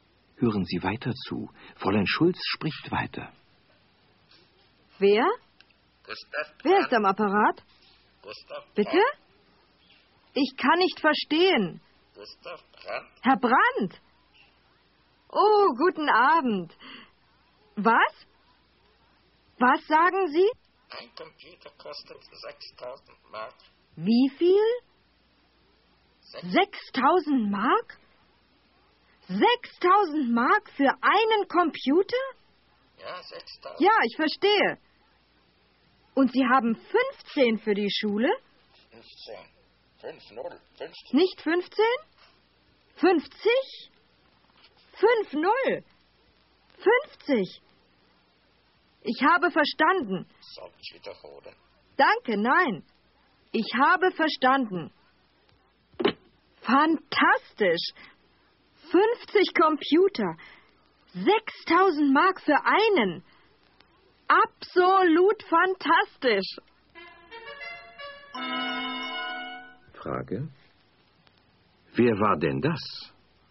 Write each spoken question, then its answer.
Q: Frage. Wer war denn das?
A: Das war Herr Brandt.